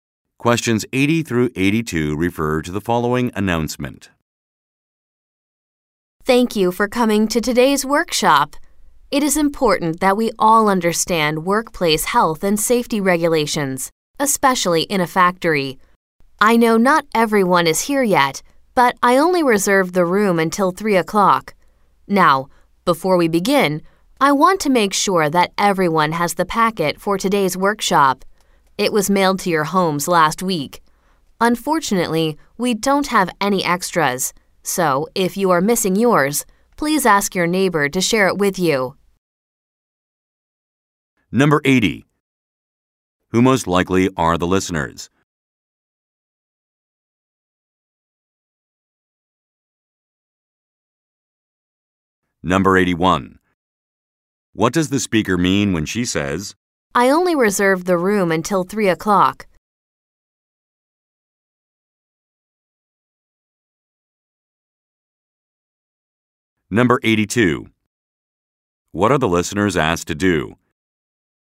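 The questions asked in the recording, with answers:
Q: Who most likely are the listeners?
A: Factory workers attending a safety workshop

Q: What are the listeners asked to do?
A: Share a packet with a neighbor if theirs is missing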